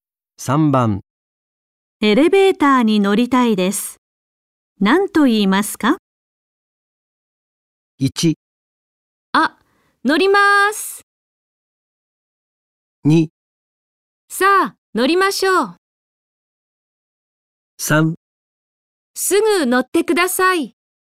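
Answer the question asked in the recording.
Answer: 1: あ、乗ります。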